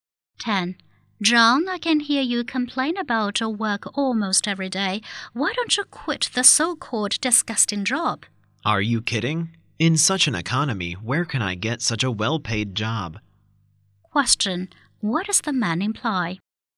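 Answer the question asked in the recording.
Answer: He won't quit because the job pays well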